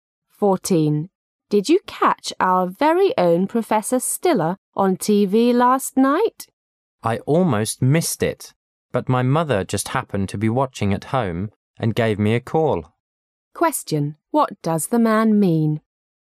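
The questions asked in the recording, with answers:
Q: What does the man mean?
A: He saw the program because his mother called him

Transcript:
[解析] W: Did you catch our very own Professor Stiller on TV last night? M: I almost missed it! But my mother just happened to be watching at home and gave me a call. Q: What does the man mean?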